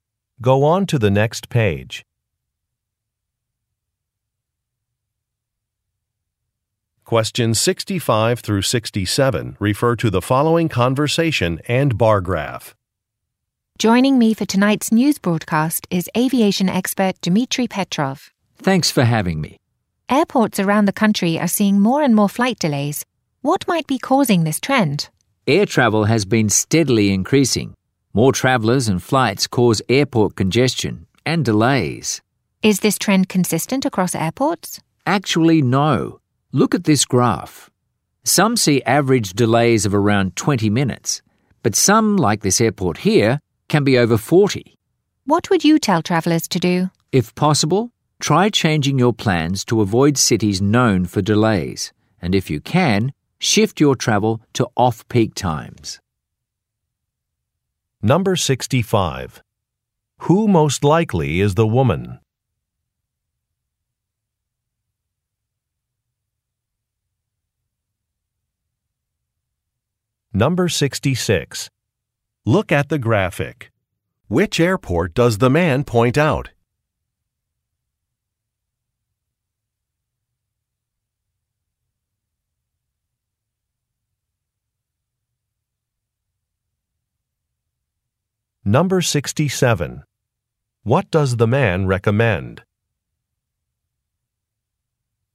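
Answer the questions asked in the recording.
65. A news broadcaster
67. Avoiding cities known for delays and traveling at off-peak times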